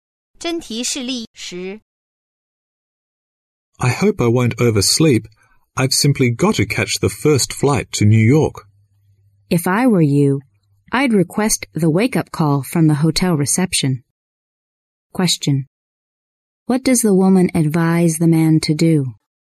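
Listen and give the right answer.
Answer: Ask hotel reception for a wake-up call.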